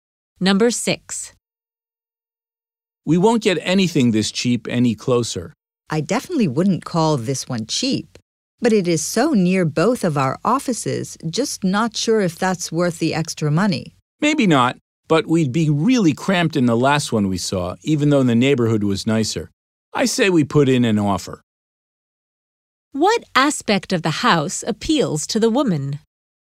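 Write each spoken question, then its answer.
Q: What aspect of the house appeals to the woman?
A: Its location near both their offices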